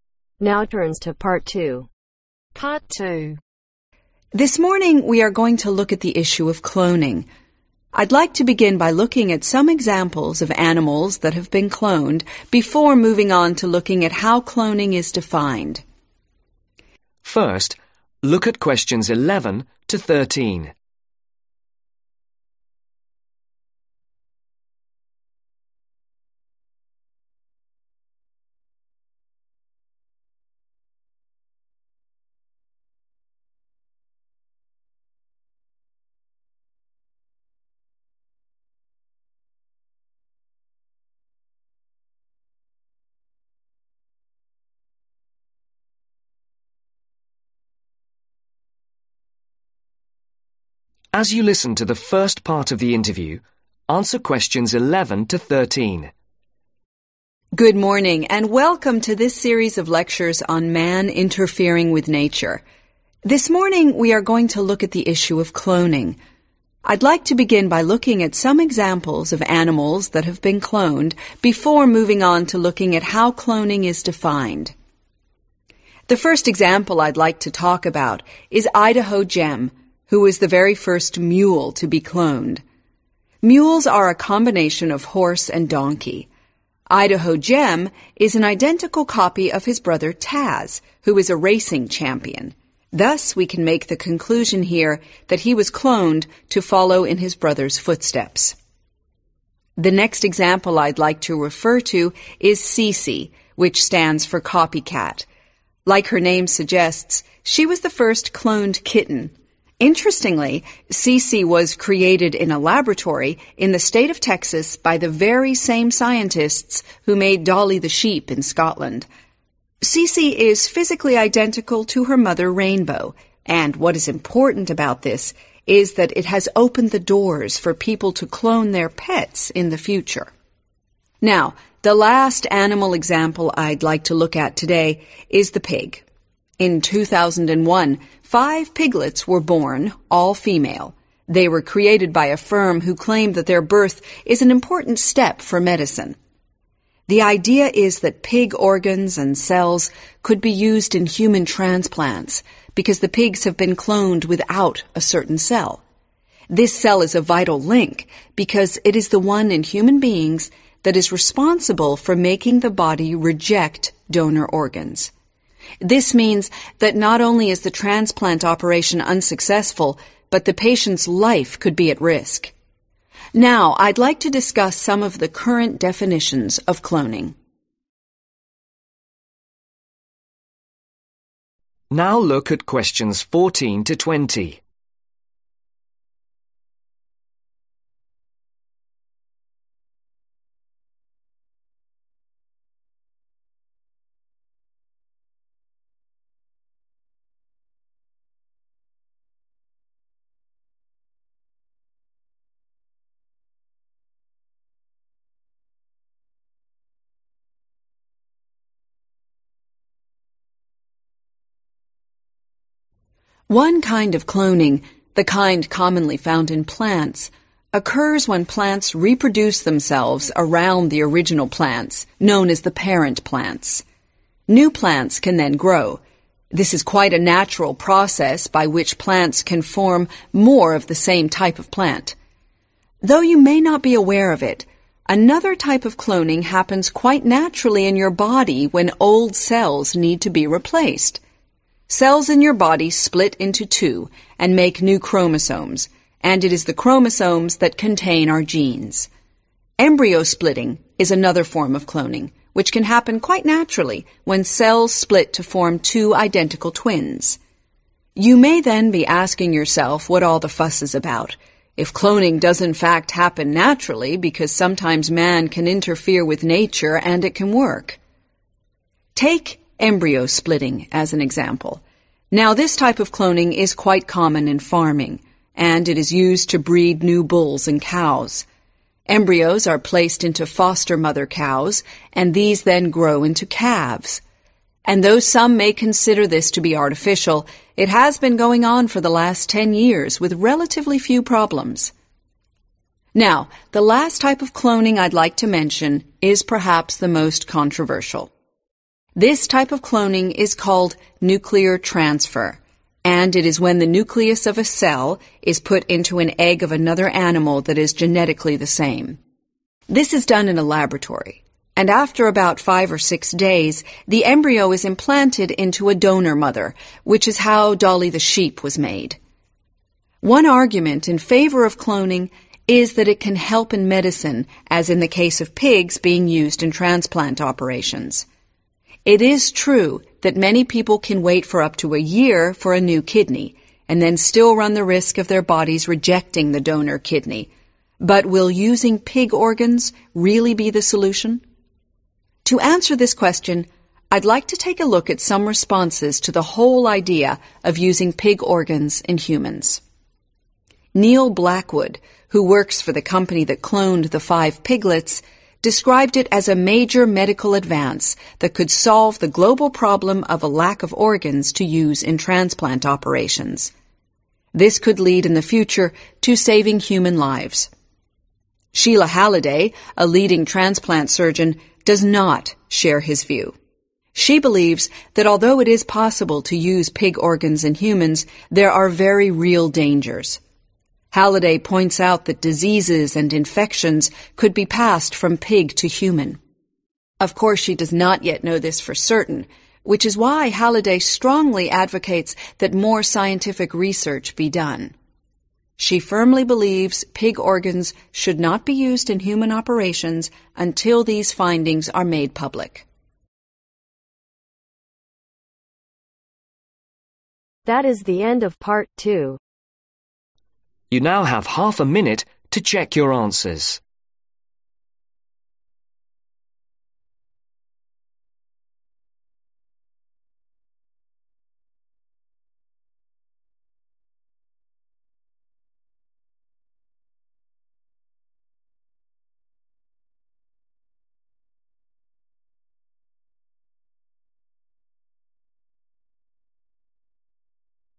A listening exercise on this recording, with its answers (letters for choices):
Write ONE WORD ONLY for each answer.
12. The first cloned kitten made in a ?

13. What could cloned pigs be used for human ?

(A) Nuclear transfer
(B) Cell replacement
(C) Plant reproduction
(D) Human transplants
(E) Embryo splitting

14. A natural process where identical copies from around the parent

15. It is used to produce new farm animals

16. An embryo is made in a laboratory and placed in a donor mother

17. What does Neil Blackwood think about cloning ?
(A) He strongly disagrees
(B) He strongly agrees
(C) He is not sure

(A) She strongly disagrees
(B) She strongly agrees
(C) She is not sure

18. Cloning pigs could save human lives in the future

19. Pigs would pass infections to humans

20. Future medical research is needed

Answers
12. laboratory
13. transplants
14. C
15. E
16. A
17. B
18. A
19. C
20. B